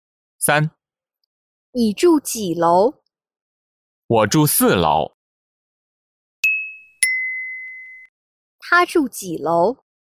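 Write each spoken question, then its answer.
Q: 他住几楼?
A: 四楼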